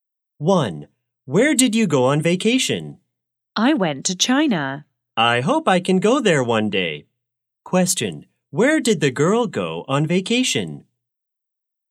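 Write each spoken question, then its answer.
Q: Question, where did the girl go on vacation?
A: China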